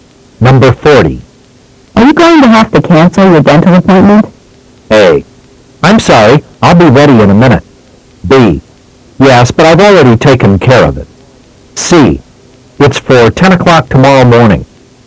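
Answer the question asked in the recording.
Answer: B: Yes, but I've already taken care of it.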